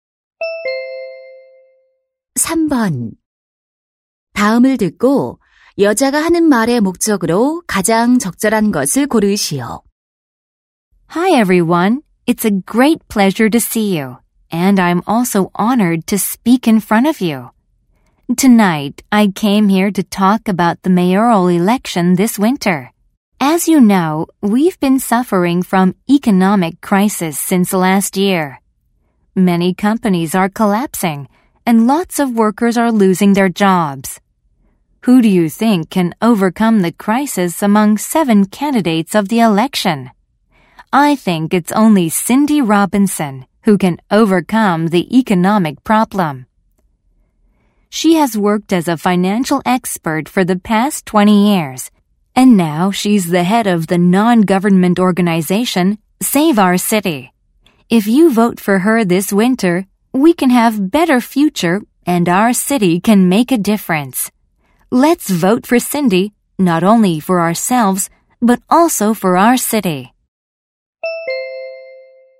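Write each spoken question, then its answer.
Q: 다음을 듣고 여자가 하는 말의 목적으로 가장 적절한 것을 고르시오.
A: 시장 선거에서 Cindy Robinson에게 투표하도록 지지를 호소하려고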